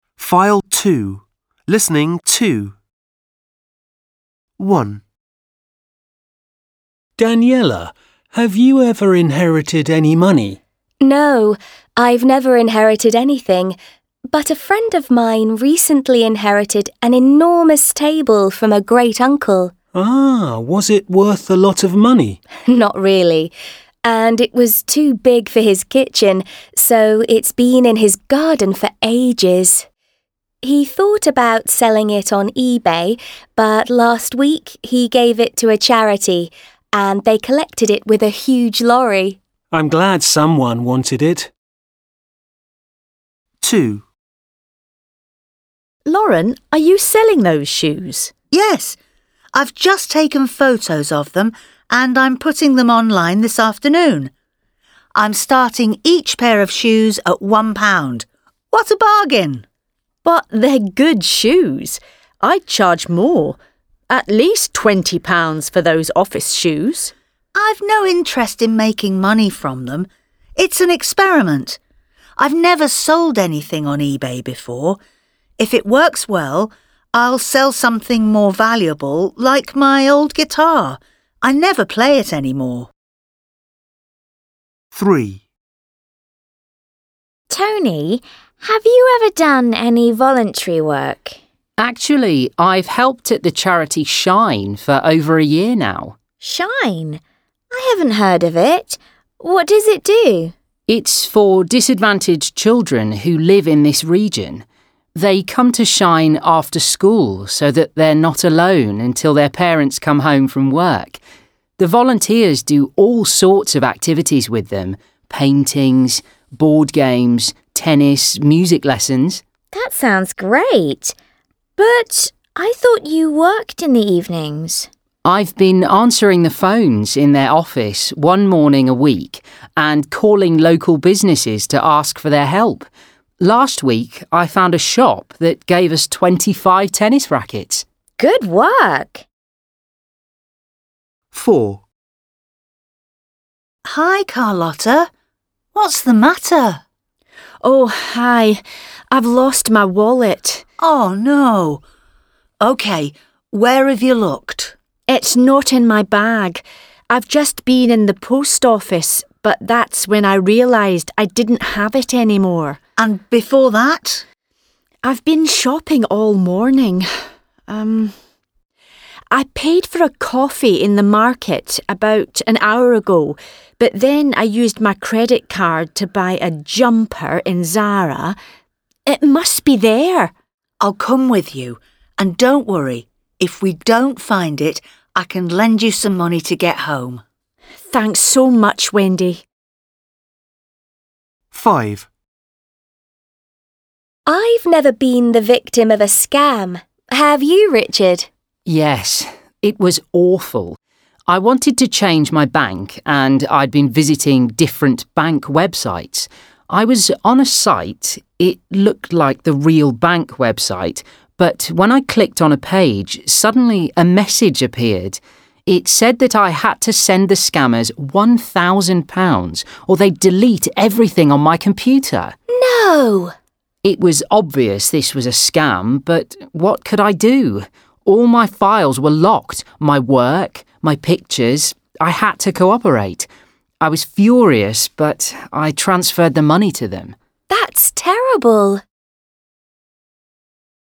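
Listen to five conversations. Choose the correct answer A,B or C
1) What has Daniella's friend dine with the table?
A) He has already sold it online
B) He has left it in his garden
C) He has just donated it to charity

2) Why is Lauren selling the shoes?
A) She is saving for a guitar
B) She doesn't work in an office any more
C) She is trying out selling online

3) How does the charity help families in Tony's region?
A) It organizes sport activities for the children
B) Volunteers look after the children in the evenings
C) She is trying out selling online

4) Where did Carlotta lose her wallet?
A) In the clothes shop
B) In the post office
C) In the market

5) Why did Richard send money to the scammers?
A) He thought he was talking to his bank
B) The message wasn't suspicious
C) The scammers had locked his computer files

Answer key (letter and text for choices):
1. C) He has just donated it to charity
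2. C) She is trying out selling online
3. A) It organizes sport activities for the children
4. A) In the clothes shop
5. C) The scammers had locked his computer files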